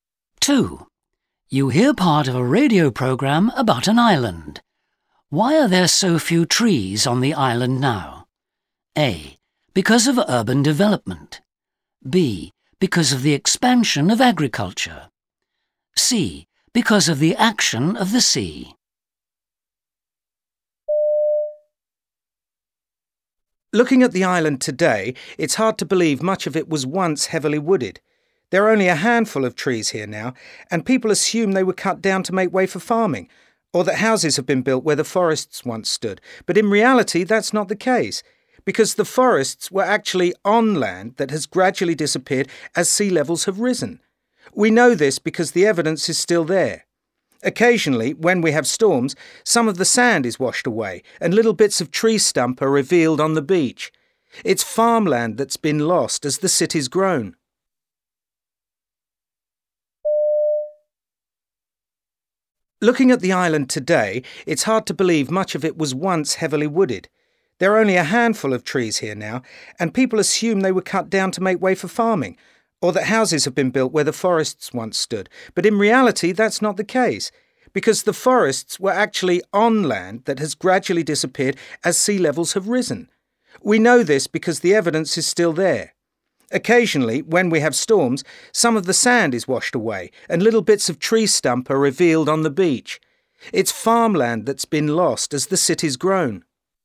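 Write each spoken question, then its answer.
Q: Why are there so few trees on the island now?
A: C: Because of the action of the sea.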